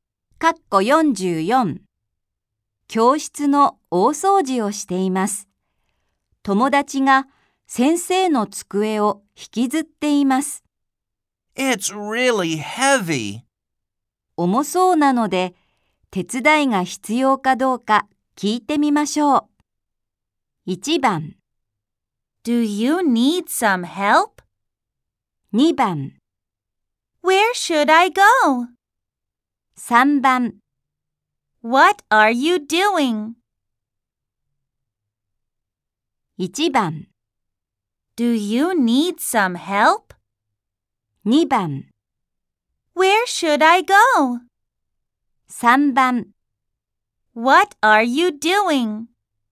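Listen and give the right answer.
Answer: 1: Do you need some help?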